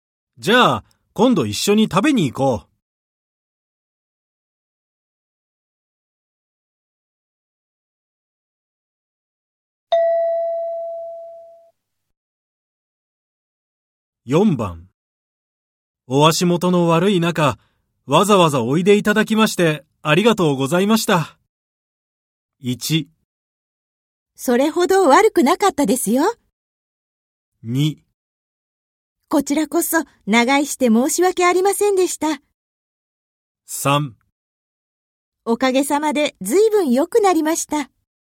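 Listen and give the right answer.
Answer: 2: こちらこそ長居して申し訳ありませんでした。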